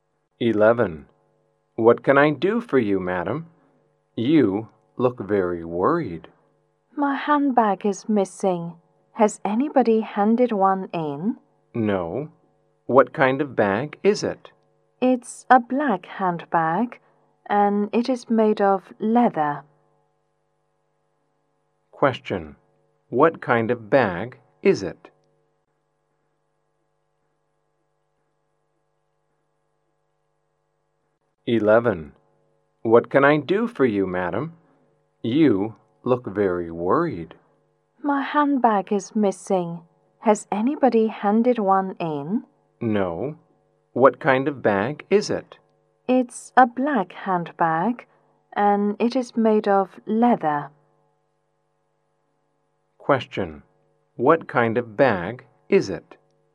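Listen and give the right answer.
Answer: A black leather handbag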